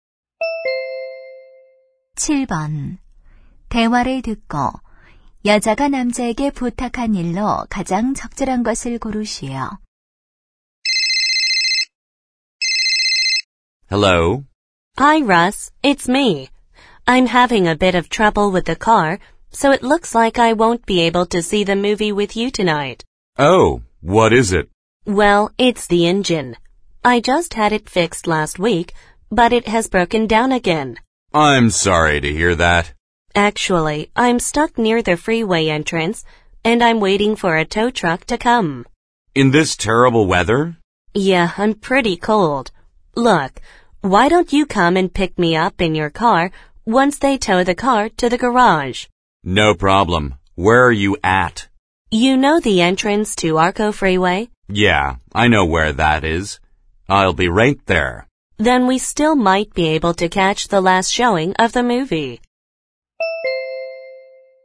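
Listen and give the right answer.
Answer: 차로 데리러 오기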